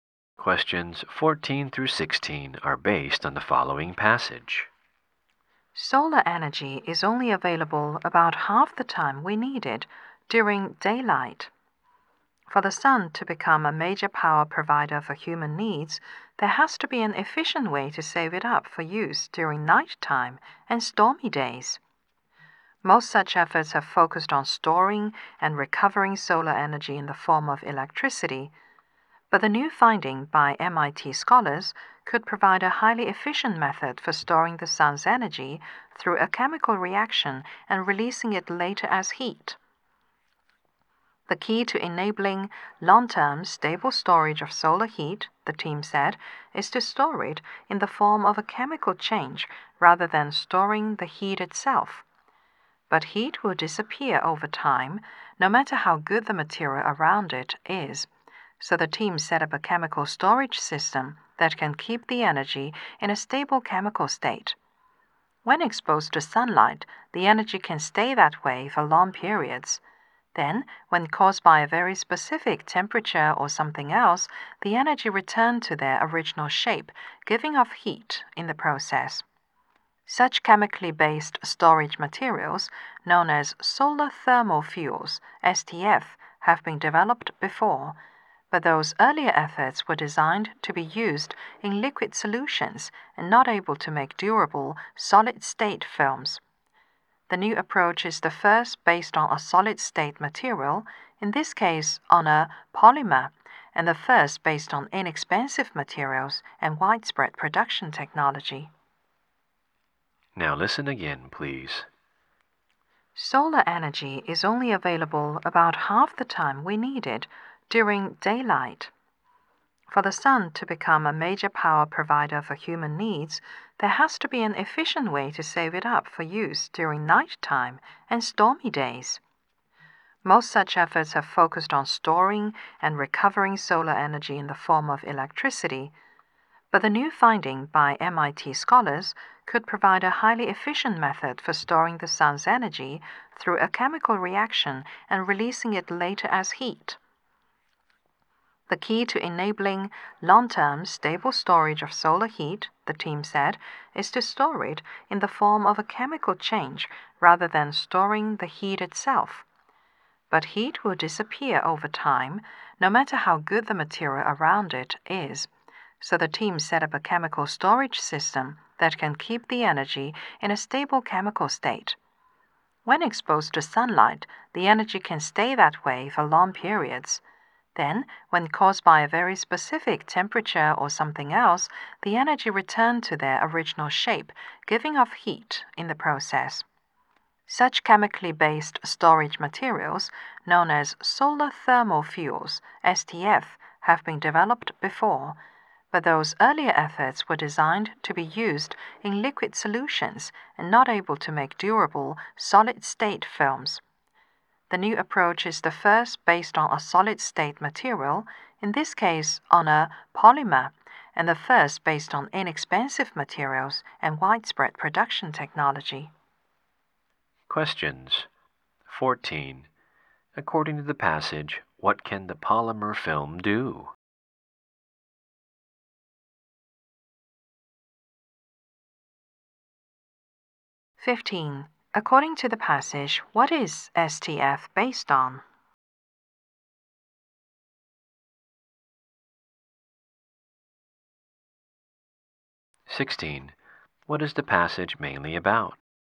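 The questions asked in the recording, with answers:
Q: What is the passage mainly about?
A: A new way to store solar energy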